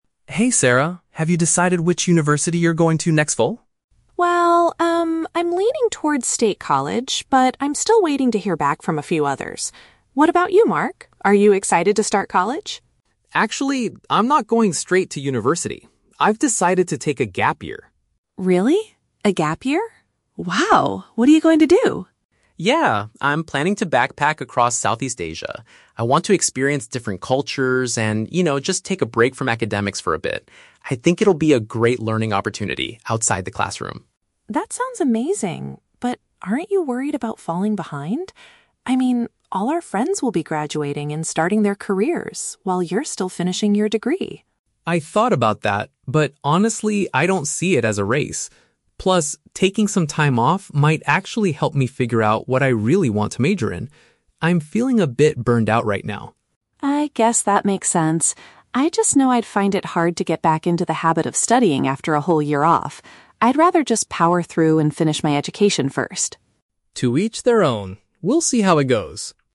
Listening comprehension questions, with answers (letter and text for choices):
Listen to the conversation between two high school seniors and choose the correct answer (A, B, or C) for each question.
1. What is Mark's main plan for the coming year?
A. He will begin his studies at State College.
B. He intends to travel overseas.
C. He is going to work to save money for university.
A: B. He intends to travel overseas.

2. What is Sarah's primary concern about Mark's decision?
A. He will be delayed compared to his peers.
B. He will forget how to study effectively.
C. He has not chosen a university major yet.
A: A. He will be delayed compared to his peers.

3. How does Mark feel about his current academic situation?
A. He is eager to learn about new cultures in college.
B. He is anxious about choosing the wrong major.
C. He is exhausted from his previous studies.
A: C. He is exhausted from his previous studies.

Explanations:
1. Mark says he is planning to "backpack across Southeast Asia." Option B uses the synonym "travel overseas". The Trap: Option (A) is wrong because State College is Sarah's potential plan, not Mark's. Option (C) is plausible for a gap year but is never mentioned in the audio.
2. Sarah asks, "aren't you worried about falling behind? ... all our friends will be graduating and starting their careers while you're still finishing". Option A paraphrases this idea. The Trap: Option (B) is a trap. Sarah mentions finding it hard to get back into the habit of studying, but this is a concern about herself ("I just know I'd find it hard..."), not her concern for Mark.
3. Mark explicitly states, "I'm feeling a bit burnt out right now" and mentions wanting to "take a break from academics". Option C paraphrases "burnt out" as "exhausted". The Trap: Option (A) uses the words "learn about new cultures", which Mark says, but he wants to do this by traveling, not "in college". Option (B) is incorrect because while he hasn't chosen a major, he views the gap year as a helpful way to figure it out, rather than feeling "anxious" about it.

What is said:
Mark: Hey Sarah, have you decided which university you're going to next fall?
Sarah: Well, um, I'm leaning towards State College, but I'm still waiting to hear back from a few others. What about you, Mark? Are you excited to start college?
Mark: Actually... I'm not going straight to university. I've decided to take a gap year.
Sarah: Really? A gap year? Wow. What are you going to do?
Mark: Yeah, I'm planning to backpack across Southeast Asia. I want to experience different cultures and, you know, just take a break from academics for a bit. I think it'll be a great learning opportunity outside the classroom.
Sarah: That sounds amazing, but... aren't you worried about falling behind? I mean, all our friends will be graduating and starting their careers while you're still finishing your degree.
Mark: I thought about that, but honestly, I don't see it as a race. Plus, taking some time off might actually help me figure out what I really want to major in. I'm feeling a bit burnt out right now.
Sarah: I guess that makes sense. I just know I'd find it hard to get back into the habit of studying after a whole year off. I'd rather just power through and finish my education first.